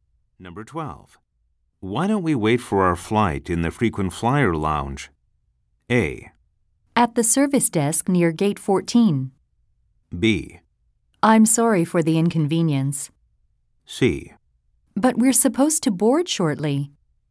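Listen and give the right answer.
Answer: C: But we're supposed to board shortly.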